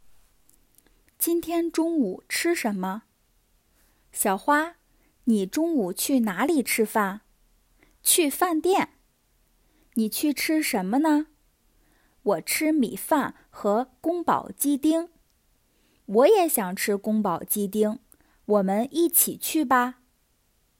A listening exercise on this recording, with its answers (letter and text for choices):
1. 小花今天中午去哪里吃饭?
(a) 饭店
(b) 学校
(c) 宿舍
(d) 公司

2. 小明也想吃什么?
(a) 米饭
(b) 宫保鸡丁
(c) 苹果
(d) 面条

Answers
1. (a) 饭店
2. (b) 宫保鸡丁

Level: beginner's